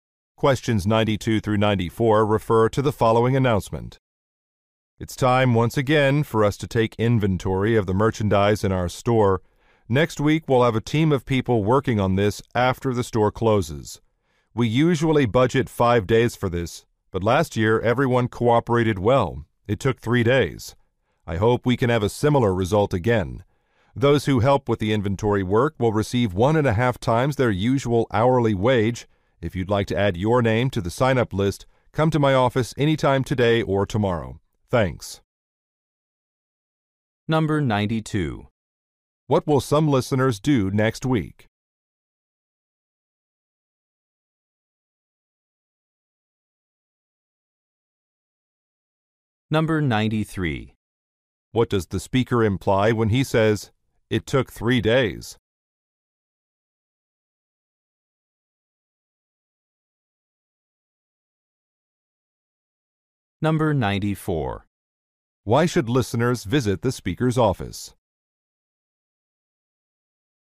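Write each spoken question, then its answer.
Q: What will some listeners do next week?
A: Take inventory of the store's merchandise

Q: Why should listeners visit the speaker's office?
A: To sign up for the inventory work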